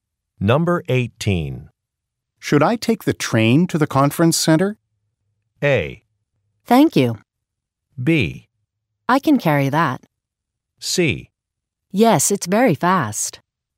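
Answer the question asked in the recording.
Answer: C: Yes, it's very fast.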